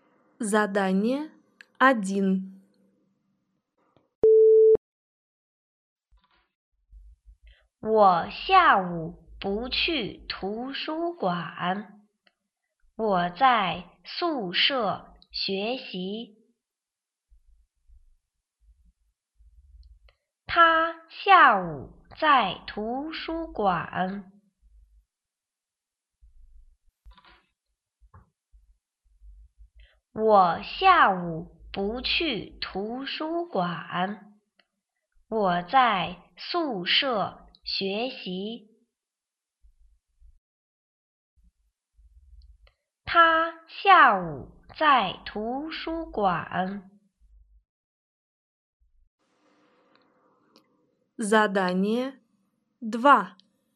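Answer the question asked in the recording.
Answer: 不对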